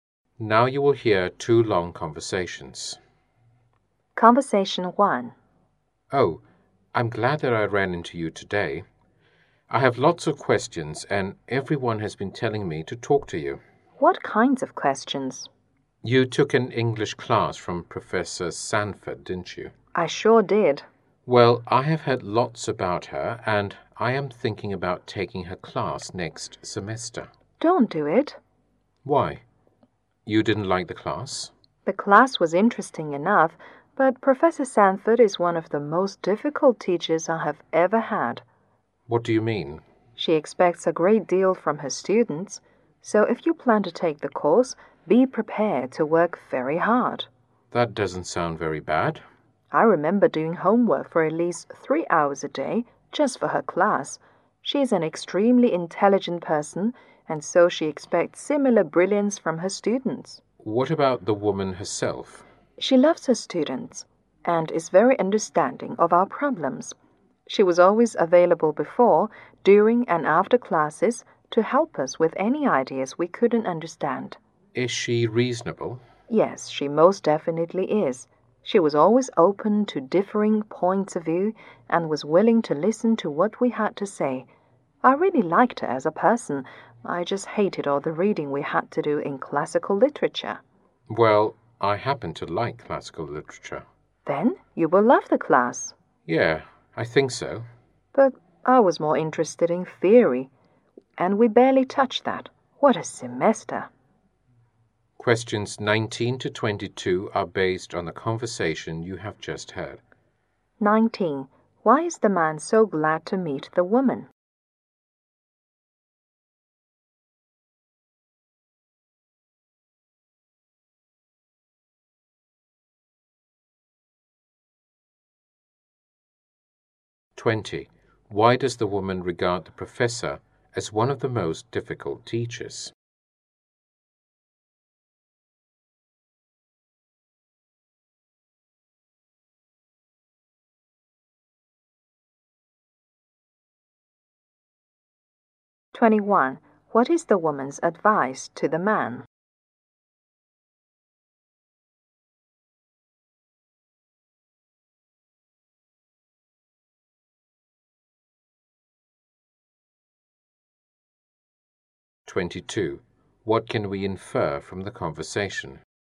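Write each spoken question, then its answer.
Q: Why is the man so glad to meet the woman?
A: He wants to ask her about Professor Sanford's class

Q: Why does the woman regard the professor as one of the most difficult teachers?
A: She expects a great deal from her students

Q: What is the woman's advice to the man?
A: Be prepared to work very hard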